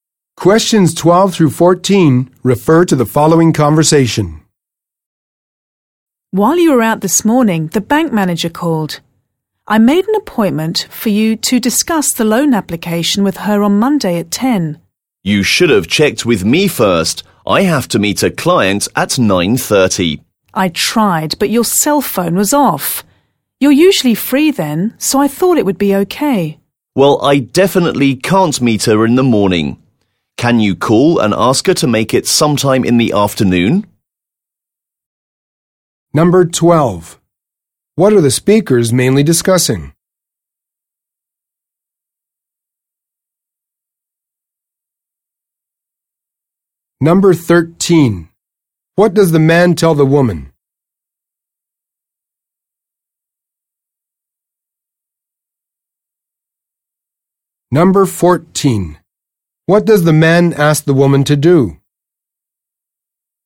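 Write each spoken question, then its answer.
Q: What are the speakers mainly discussing?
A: An appointment with the bank manager about a loan

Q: What does the man tell the woman?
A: He has to meet a client at 9:30

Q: What does the man ask the woman to do?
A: Call the bank manager and reschedule for the afternoon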